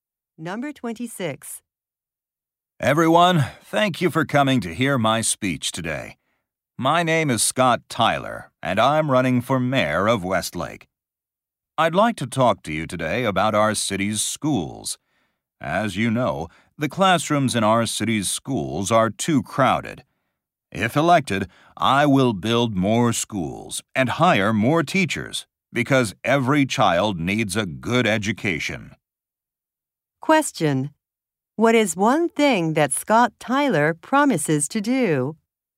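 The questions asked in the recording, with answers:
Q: What is one thing that Scott Tyler promises to do?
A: Build more schools and hire more teachers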